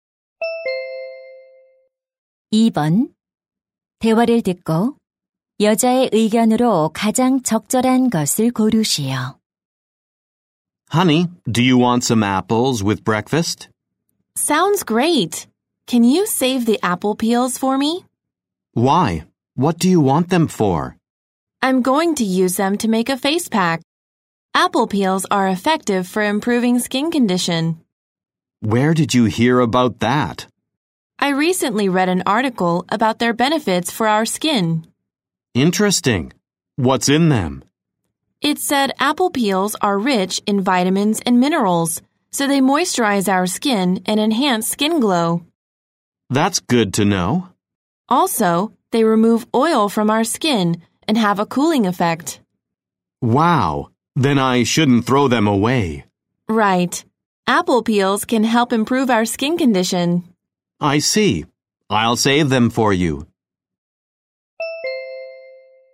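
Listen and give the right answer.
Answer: 사과 껍질은 피부 상태 개선에 도움이 된다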